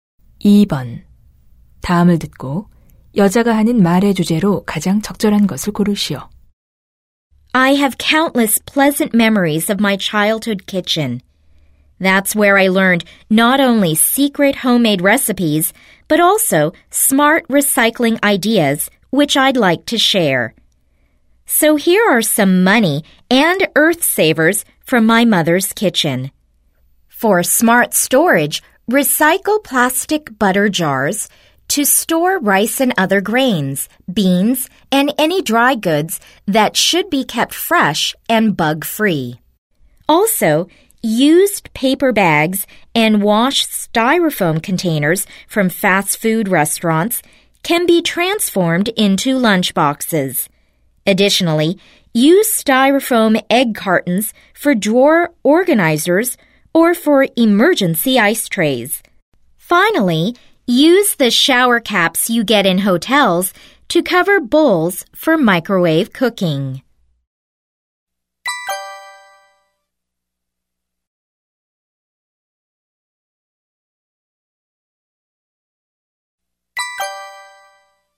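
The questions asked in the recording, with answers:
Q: 다음을 듣고 여자가 하는 말의 주제로 가장 적절한 것을 고르시오.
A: 부엌 용품 재활용 아이디어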